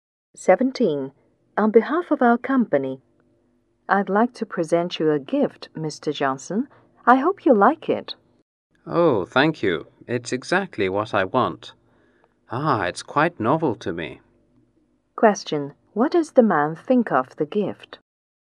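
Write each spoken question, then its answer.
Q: What does the man think of the gift?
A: He likes it; it's exactly what he wants.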